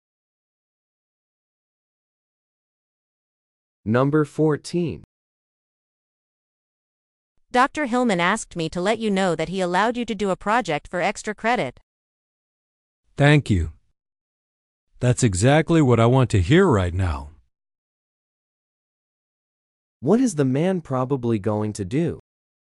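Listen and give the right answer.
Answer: Do a project for extra credit.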